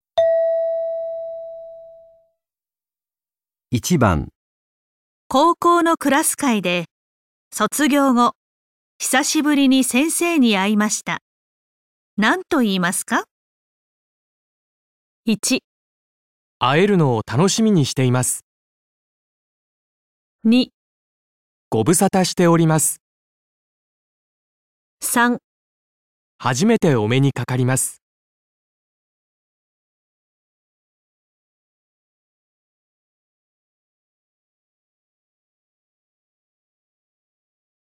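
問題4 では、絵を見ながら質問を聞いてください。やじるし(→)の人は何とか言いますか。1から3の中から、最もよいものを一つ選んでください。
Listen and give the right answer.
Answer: 2

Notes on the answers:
高中同学聚会上,遇到了毕业后很久不见的老师。要说什么好呢? 1.很期待和您的见面。 2.好久不见。 3.初次见面。 原文 高校のクラス会で、卒業後久しぶりに先生に会いました。何と言いますか。 1.会えるのを楽しみにしています。 2.ご無沙汰しております。 3.初めてお目にかかります。

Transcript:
高校のクラス会で、卒業後久しぶりに先生に会いました。何と言いますか。
1.会えるのを楽しみにしています。
2.ご無沙汰しております。
3.初めてお目にかかります。

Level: N3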